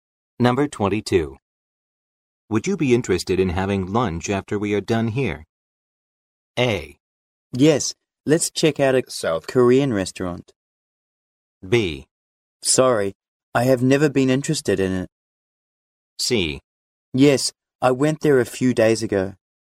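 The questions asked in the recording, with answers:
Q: Would you be interested in having lunch after we are done here?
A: A: Yes, let's check out a South Korean restaurant.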